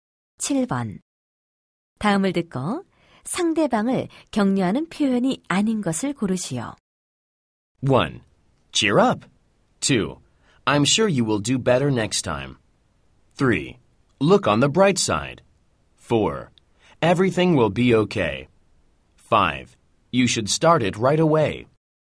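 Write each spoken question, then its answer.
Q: 다음을 듣고 상대방을 격려하는 표현이 아닌 것을 고르시오.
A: 5: You should start it right away.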